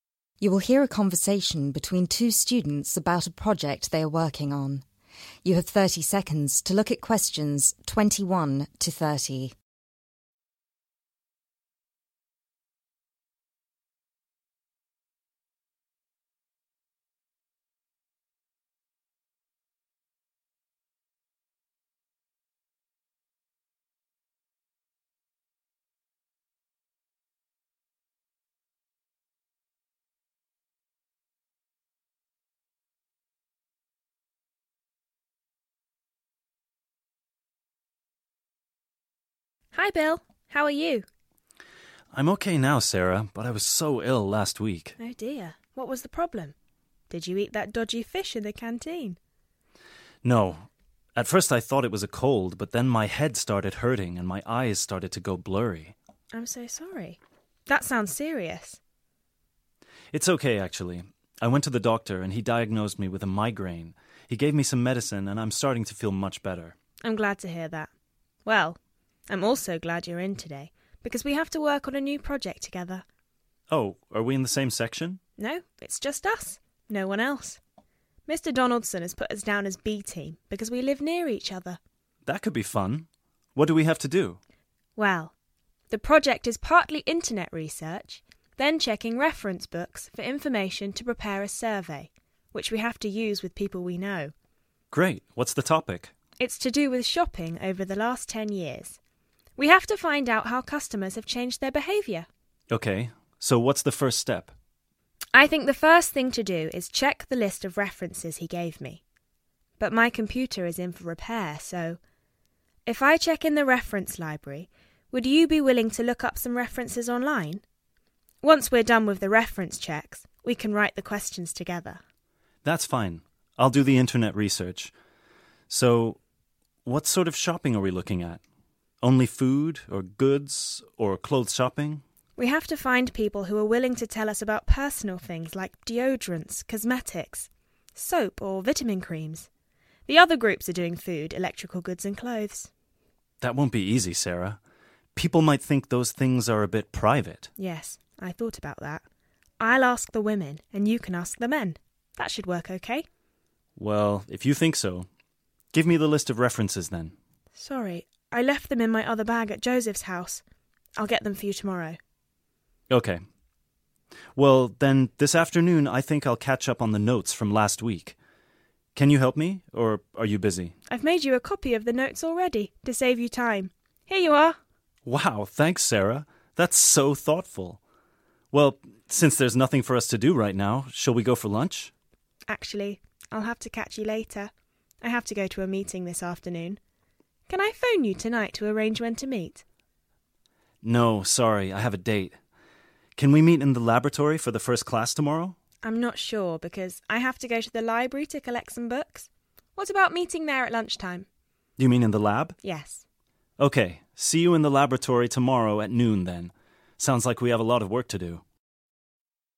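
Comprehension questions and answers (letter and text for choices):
Choose the correct letter: A, B or C.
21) Bill was ill. What was wrong?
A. A cold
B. A food allergy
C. A severe pain in his head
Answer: C. A severe pain in his head

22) Bill and Sarah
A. live near each other.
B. have never worked on a project together.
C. have plans for later that evening.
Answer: A. live near each other.

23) Bill and Sarah have to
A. research and write a survey questionnaire.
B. ask shopkeepers questions.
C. submit their project via the internet.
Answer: A. research and write a survey questionnaire.

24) What does Sarah want Bill to do?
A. Visit the library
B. Write a list of questions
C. Use a computer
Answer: C. Use a computer

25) Which of the following items will be included in Bill and Sarah's research?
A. Deodorants and cosmetics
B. Electrical goods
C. Food and clothing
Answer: A. Deodorants and cosmetics

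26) With what aspect of the project does Bill express concern?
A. Meeting the project's timeline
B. Invading people's privacy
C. Finding enough reference material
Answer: B. Invading people's privacy

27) What does Bill plan to do for the rest of the day?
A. Review the notes from the previous week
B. Prepare for his next meeting with Sarah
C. Find people to participate in the research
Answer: A. Review the notes from the previous week

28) What does Sarah do for Bill?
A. Lets him borrow her book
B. Gives him a copy of her notes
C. Promises to help him study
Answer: B. Gives him a copy of her notes

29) What does Sarah have to do at the library?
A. Research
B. Meet Bill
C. Collect some books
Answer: C. Collect some books

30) Where do Bill and Sarah agree to meet the next day?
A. In the library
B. In class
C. In the laboratory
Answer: C. In the laboratory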